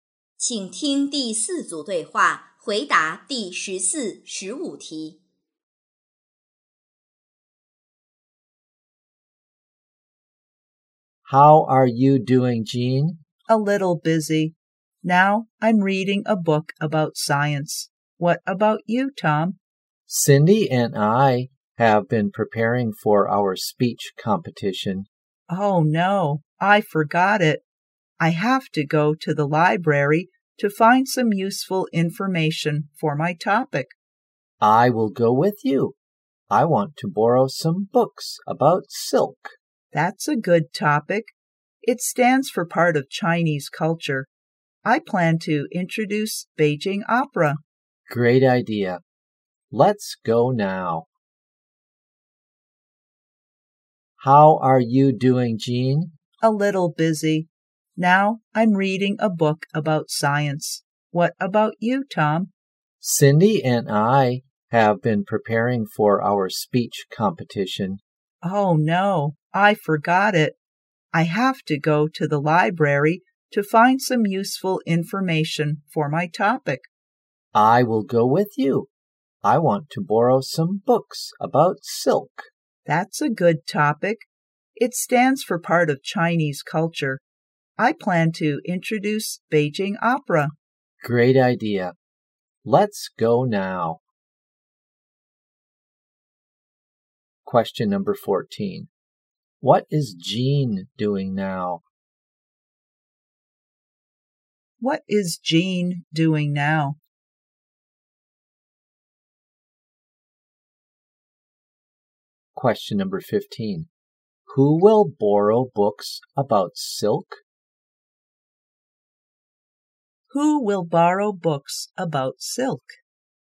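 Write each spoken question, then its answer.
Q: What is Jean doing now?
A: Reading a book about science.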